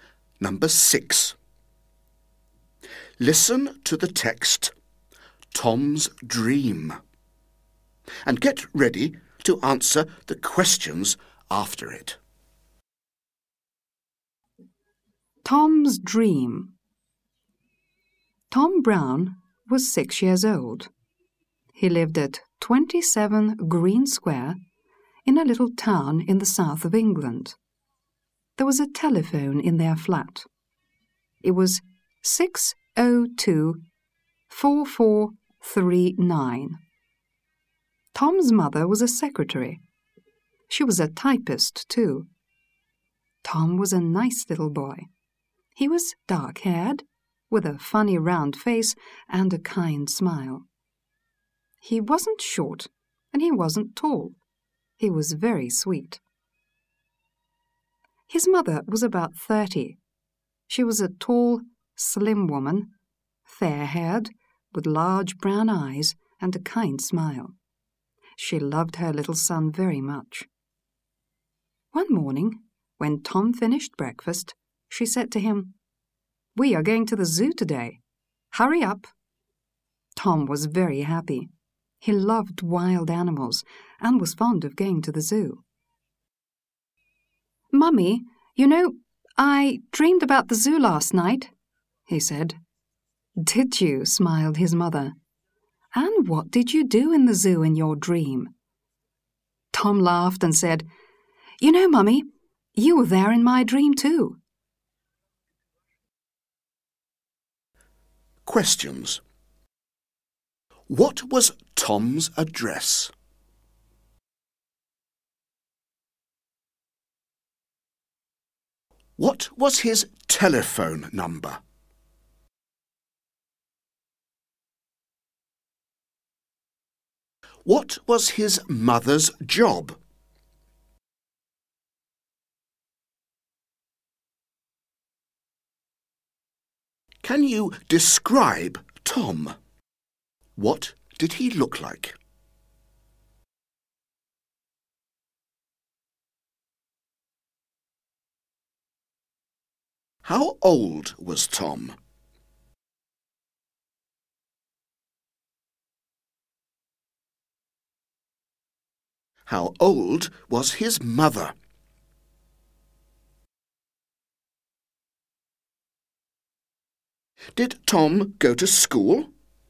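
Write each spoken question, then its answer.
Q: What was Tom's address?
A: 27 Green Square

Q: What was his telephone number?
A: 602-4439

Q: What was his mother's job?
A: A secretary and a typist

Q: Can you describe Tom? What did he look like?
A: Dark-haired, with a funny round face and a kind smile, neither short nor tall

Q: How old was Tom?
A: 6 years old

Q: How old was his mother?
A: About 30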